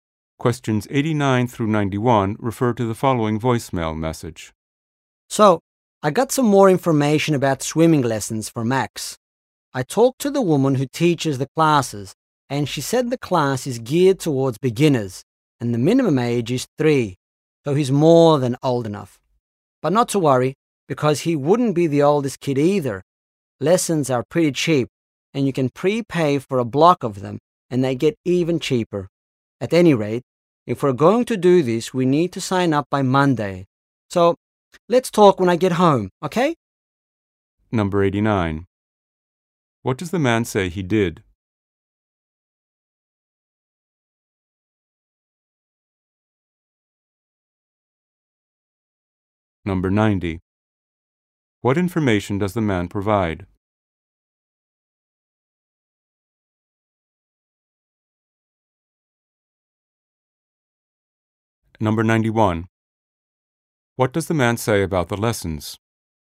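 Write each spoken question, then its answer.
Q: What does the man say he did?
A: He talked to the swimming teacher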